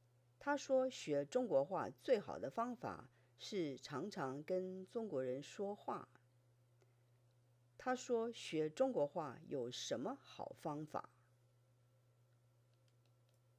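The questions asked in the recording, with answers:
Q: 他说学中国话有什么好方法?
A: 常常跟中国人说话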